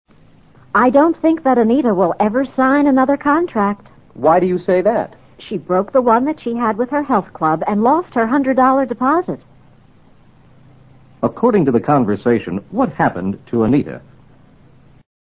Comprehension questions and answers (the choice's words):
According to the conversation, what happened to Anita?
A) She lost a hundred dollars on the way to the health club.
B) She received a refund of one hundred dollars from the health club.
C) She refused to sign a contract with the health club.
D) She failed to keep her contract with the health club.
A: She failed to keep her contract with the health club.

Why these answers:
She broke the one she had with her health club:她中止了她和健康俱乐部签定的合同。并因中止合同而损失一百美元的压金。broke the contract 与failed to keep her contract 意思相同。Refund: 退回的押金。